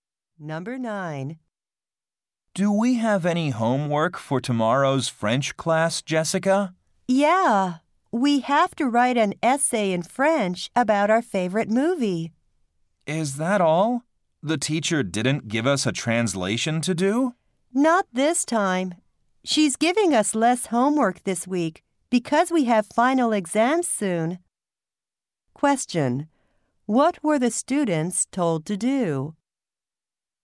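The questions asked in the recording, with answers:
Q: What were the students told to do?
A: Write an essay in French about their favorite movie.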